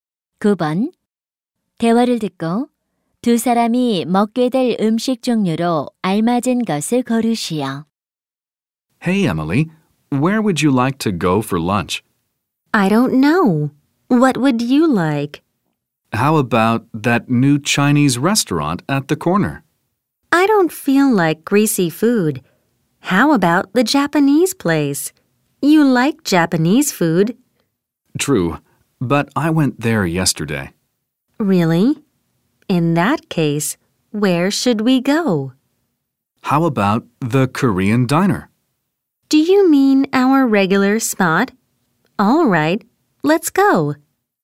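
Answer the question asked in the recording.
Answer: 한식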